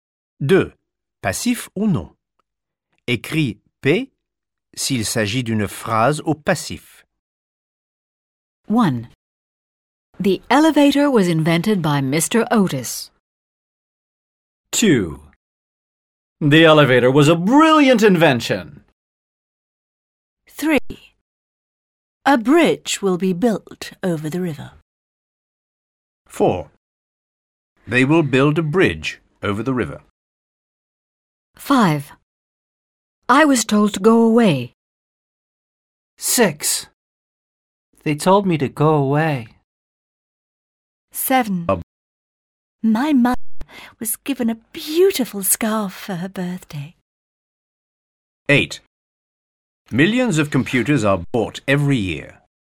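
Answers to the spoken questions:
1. P (passive)
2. not passive
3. P (passive)
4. not passive
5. P (passive)
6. not passive
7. P (passive)
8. P (passive)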